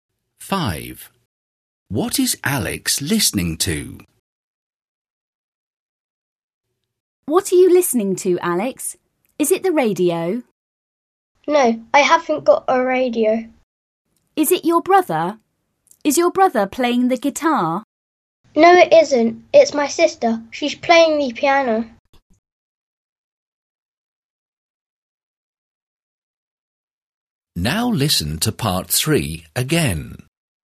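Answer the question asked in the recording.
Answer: His sister playing the piano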